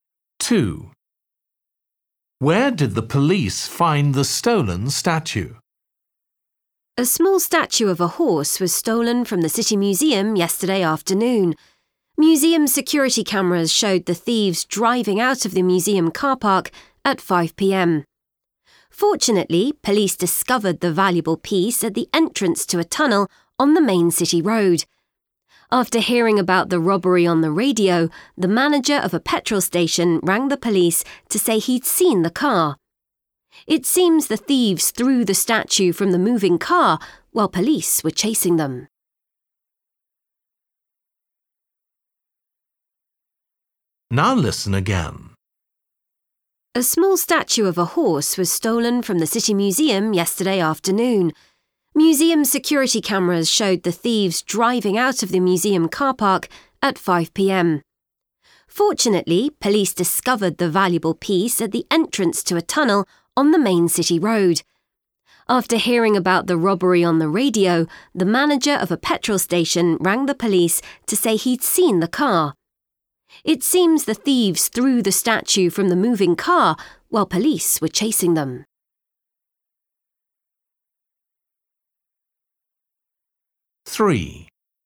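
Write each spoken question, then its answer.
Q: Where did the police find the stolen statue?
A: At the entrance to a tunnel on the main city road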